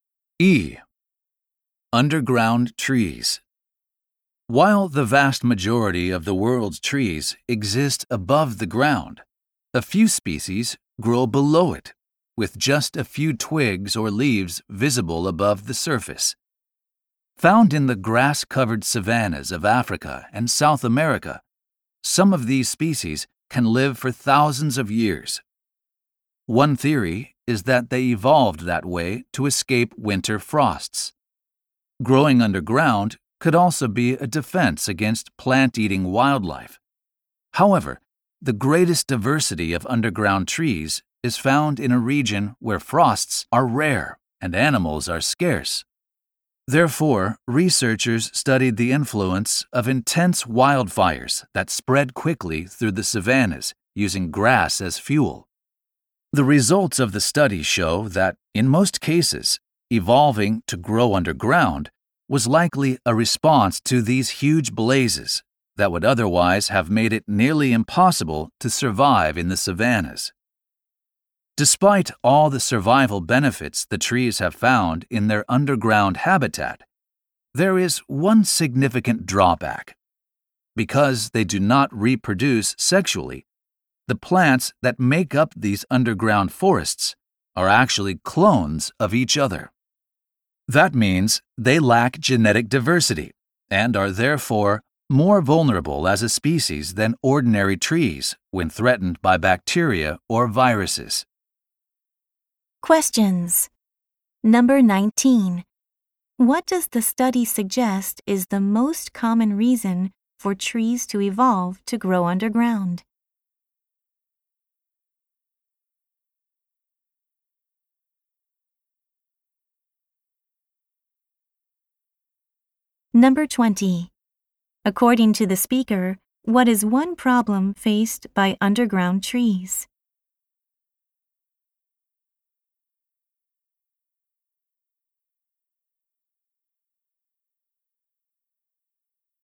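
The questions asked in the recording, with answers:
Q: What does the study suggest is the most common reason for trees to evolve to grow underground?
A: To survive intense wildfires in the savannas.

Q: According to the speaker, what is one problem faced by underground trees?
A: They are clones without genetic diversity, so they are vulnerable to bacteria or viruses.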